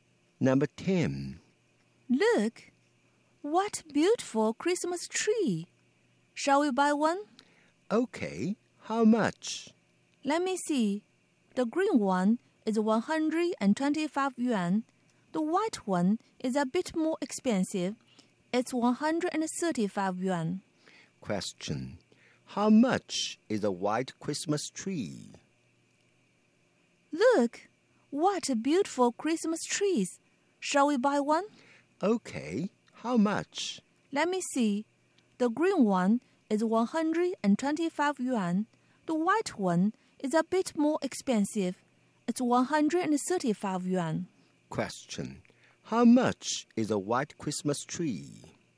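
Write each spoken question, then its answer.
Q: How much is a white Christmas tree?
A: 135 yuan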